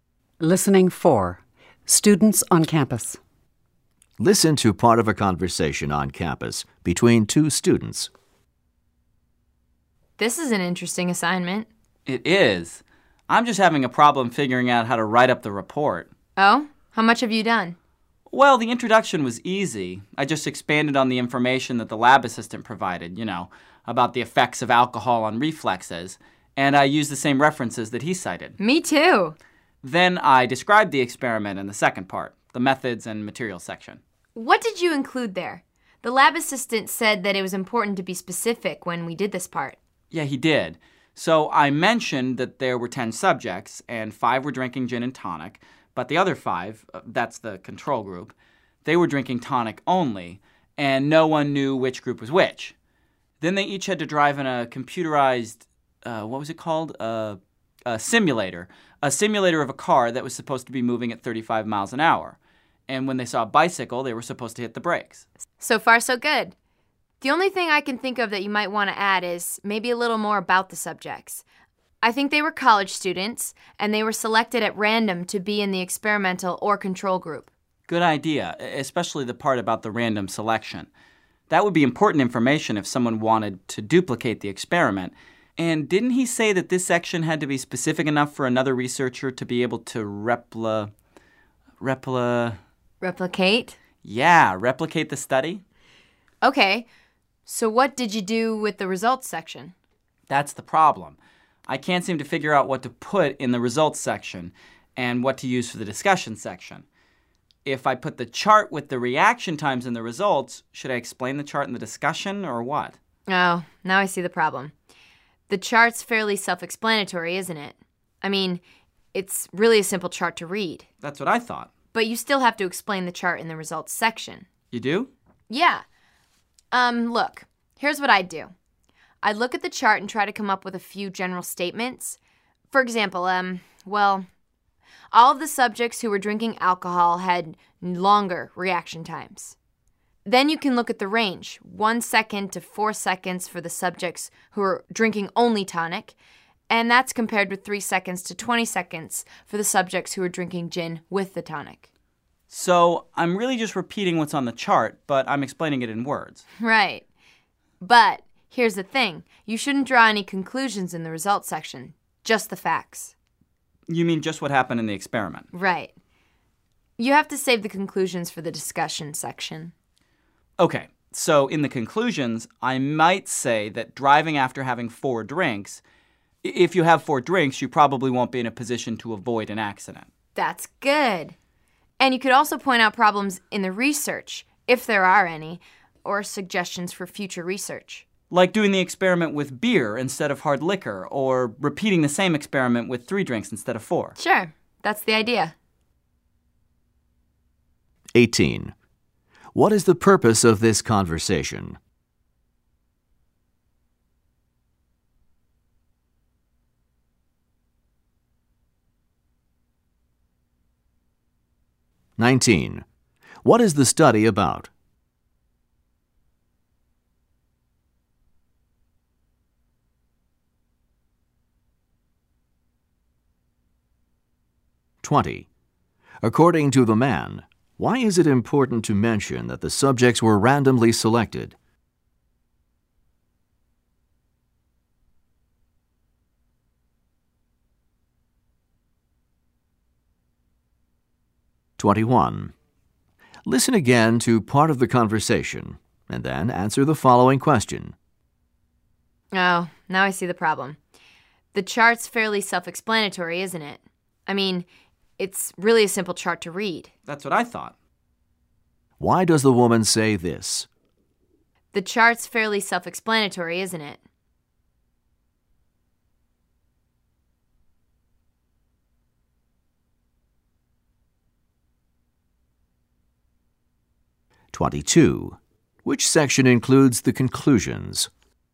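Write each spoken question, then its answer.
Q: What is the purpose of this conversation?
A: To discuss how to write up a lab report

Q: What is the study about?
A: The effects of alcohol on reflexes (reaction times)

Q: According to the man, why is it important to mention that the subjects were randomly selected?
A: So another researcher could replicate the experiment

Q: Which section includes the conclusions?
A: The discussion section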